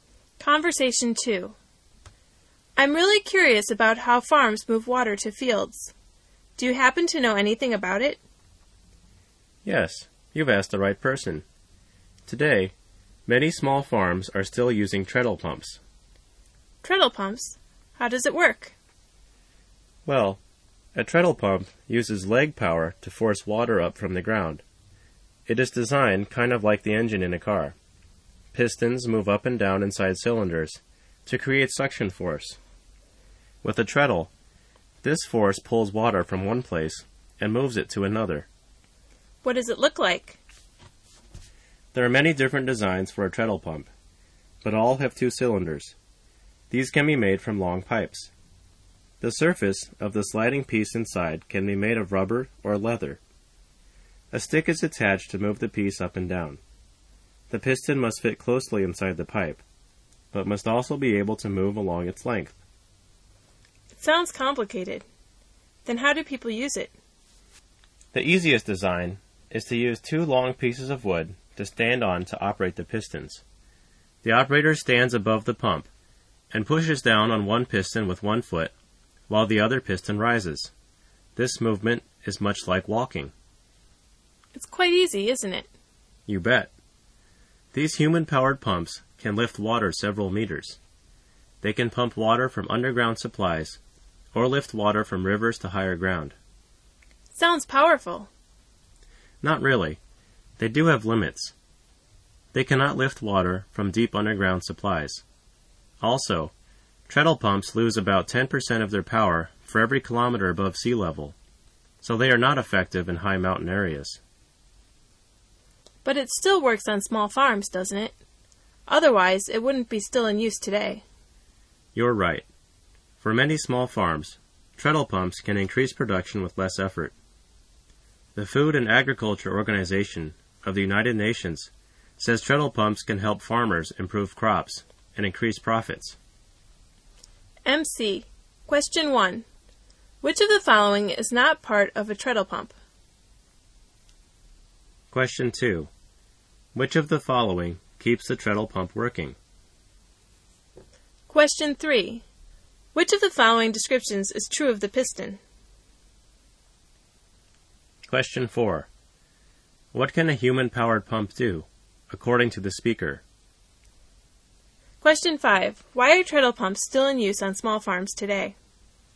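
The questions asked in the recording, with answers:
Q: Which of the following keeps the treadle pump working?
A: Leg power (human power)

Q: What can a human-powered pump do, according to the speaker?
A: Lift water several meters

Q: Why are treadle pumps still in use on small farms today?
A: They can increase production with less effort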